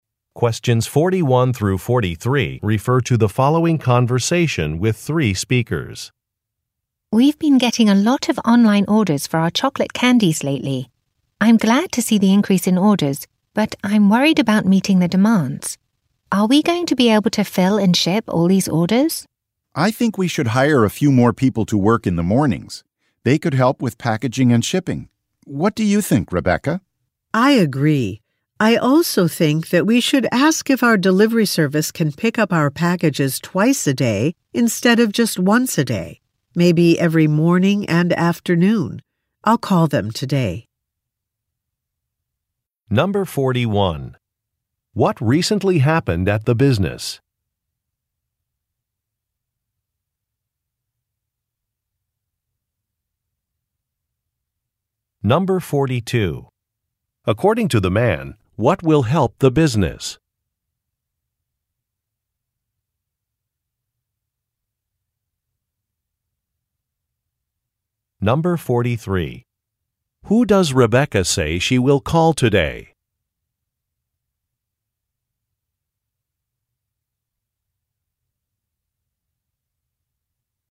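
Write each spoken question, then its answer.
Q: What recently happened at the business?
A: It has been getting many more online orders for its chocolate candies.

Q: Who does Rebecca say she will call today?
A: The delivery service.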